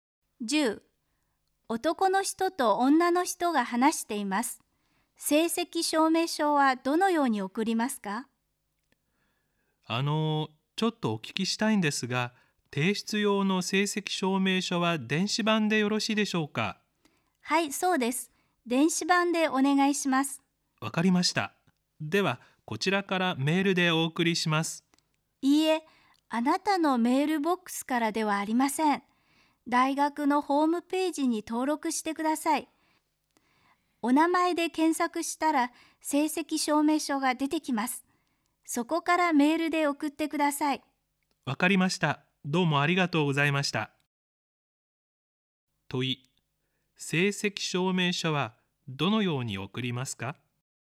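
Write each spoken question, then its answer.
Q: 問い。成績証明書はどのように送りますか?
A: 大学のホームページに登録し、名前で検索して出てきた証明書をそこからメールで送る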